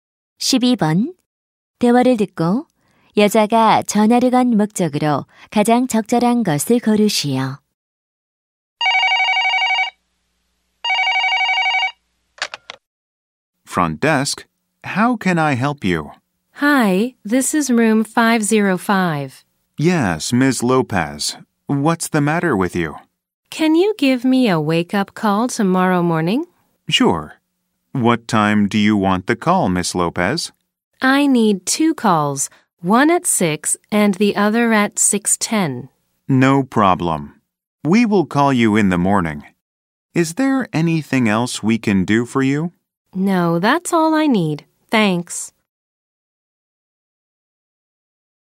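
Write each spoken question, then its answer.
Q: 대화를 듣고 여자가 전화를 건 목적으로 가장 적절한 것을 고르시오.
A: 모닝콜 요청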